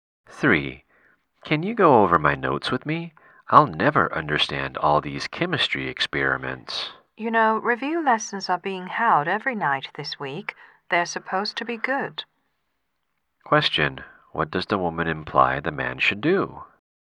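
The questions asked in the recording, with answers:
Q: What does the woman imply the man should do?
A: Go to the review lessons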